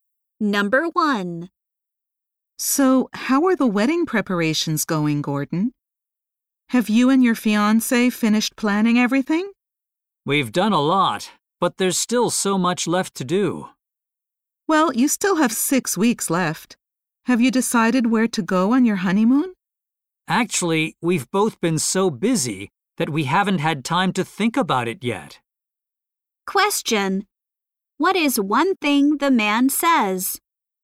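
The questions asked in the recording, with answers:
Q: What is one thing the man says?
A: He and his fiancée haven't had time to think about their honeymoon yet.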